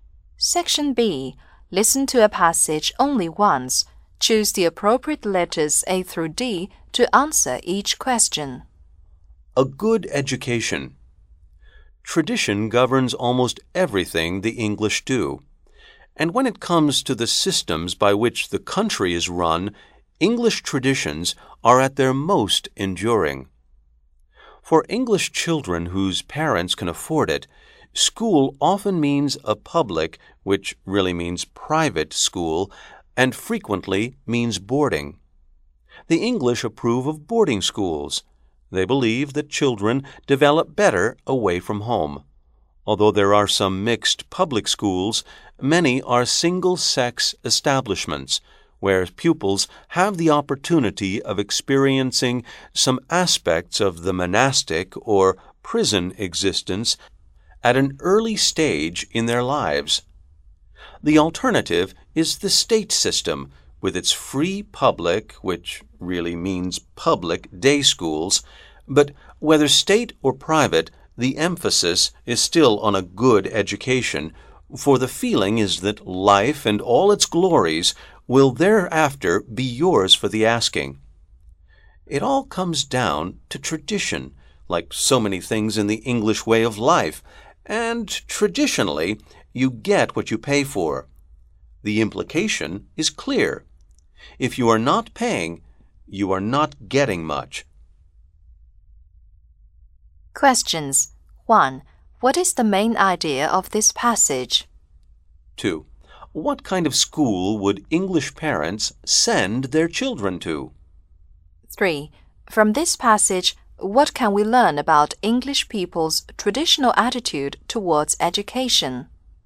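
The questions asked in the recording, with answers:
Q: What kind of school would English parents send their children to?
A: Private (public) boarding schools, if they can afford it.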